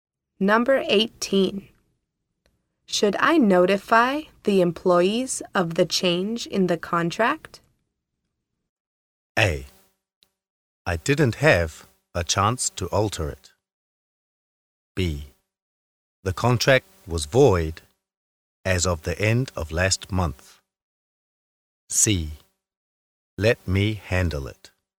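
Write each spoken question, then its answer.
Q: Should I notify the employees of the change in the contract?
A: C: Let me handle it.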